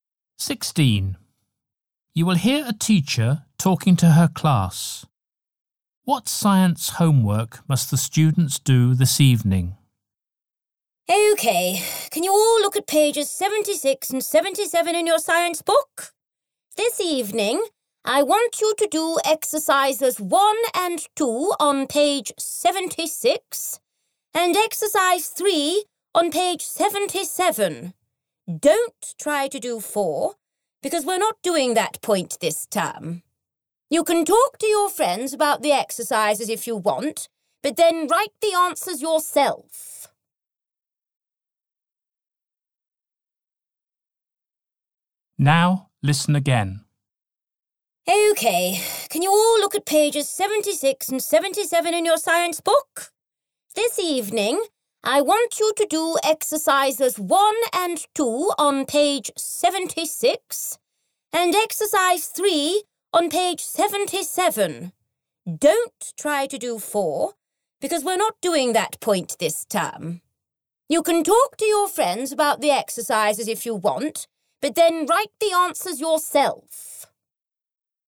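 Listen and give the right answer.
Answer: Exercises 1 and 2 on page 76 and exercise 3 on page 77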